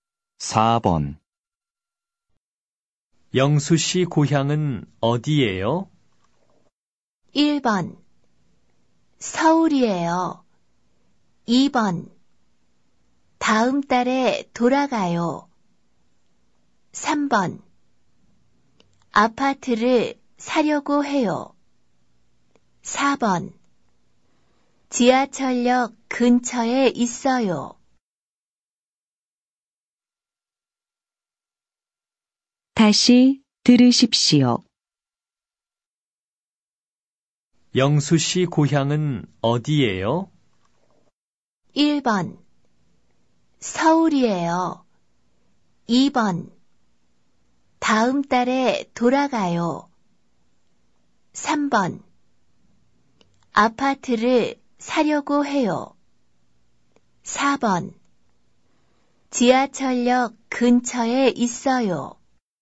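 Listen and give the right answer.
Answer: 1: 서울이에요.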